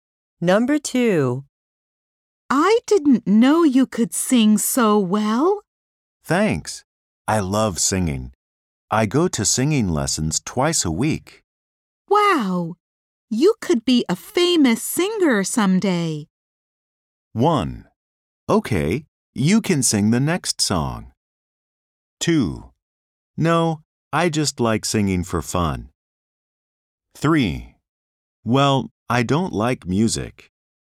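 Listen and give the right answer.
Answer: 2: No, I just like singing for fun.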